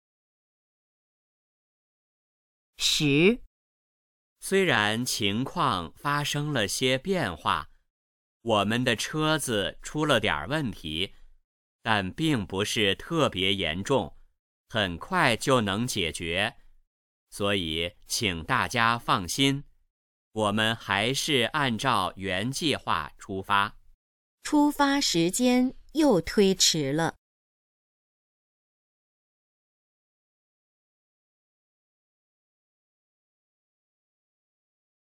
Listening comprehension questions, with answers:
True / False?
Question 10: 出发时间又推迟了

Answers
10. False

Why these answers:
The audio mentions problems, BUT states they'll depart as initially planned.

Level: HSK 4